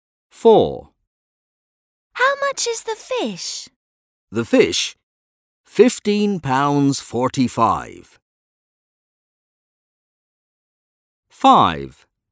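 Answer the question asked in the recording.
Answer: £15.45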